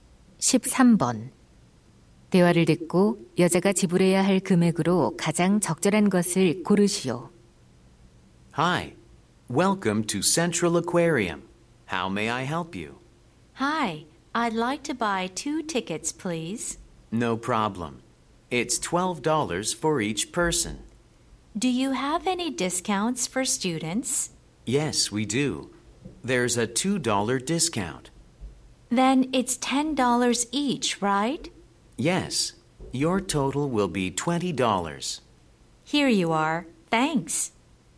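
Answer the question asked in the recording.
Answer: 20달러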